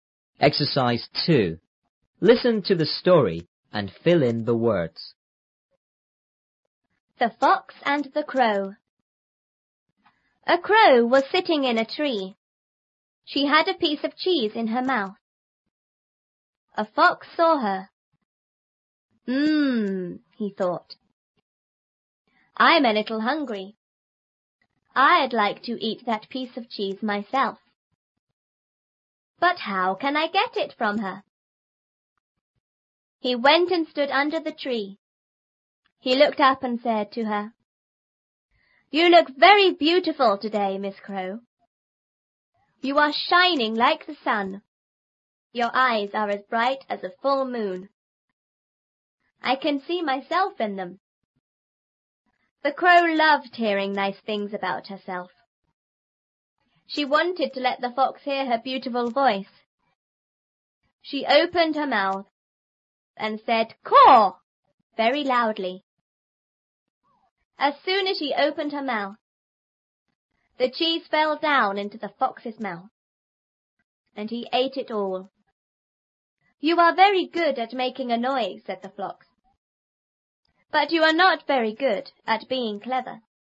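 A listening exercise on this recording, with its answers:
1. "I'm a little___!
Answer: hungry

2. I'd like to eat that piece of cheese___!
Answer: myself

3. He went and___under the tree.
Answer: stood

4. You are___like the sun.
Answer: shining

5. Your eyes are as___as a full moon.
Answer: bright

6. I can see___in them."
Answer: myself

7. The crow loved hearing nice things about___.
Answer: herself

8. and said "Caw!"very___.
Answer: loudly

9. As___as she opened her mouth,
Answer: soon

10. and he___it all.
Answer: ate

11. "but you are not very good at being___!"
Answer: clever

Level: 初中英语广州版3B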